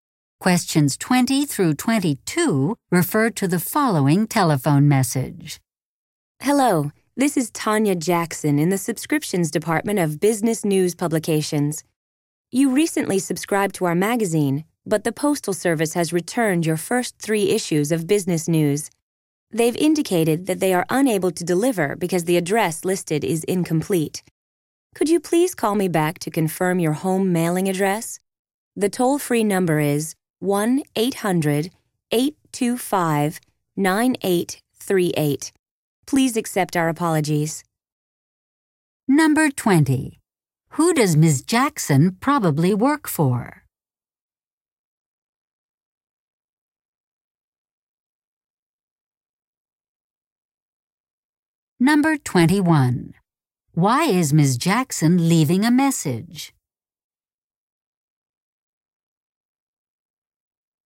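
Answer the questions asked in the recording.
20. Business News Publications (subscriptions department)
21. To ask the subscriber to call back and confirm their home mailing address, because the magazines were returned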